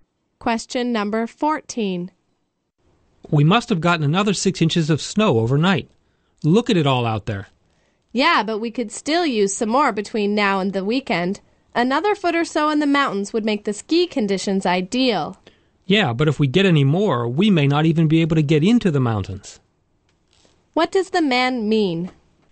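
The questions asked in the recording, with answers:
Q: What does the man mean?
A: More snow might block the roads into the mountains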